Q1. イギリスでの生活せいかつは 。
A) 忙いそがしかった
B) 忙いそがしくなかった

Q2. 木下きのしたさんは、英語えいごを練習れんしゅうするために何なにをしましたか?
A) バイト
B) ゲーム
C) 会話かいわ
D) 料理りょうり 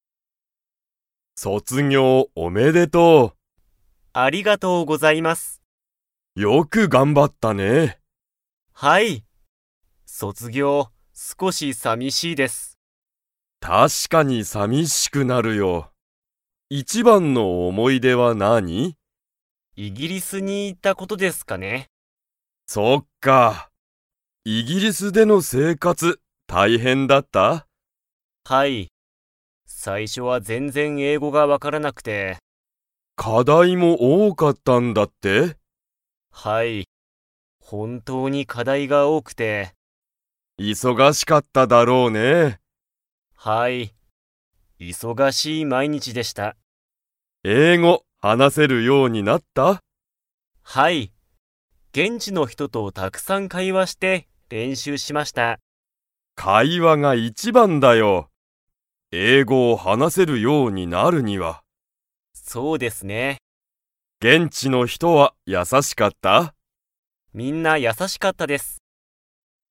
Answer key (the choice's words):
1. 忙いそがしかった
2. 会話かいわ

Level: Level 4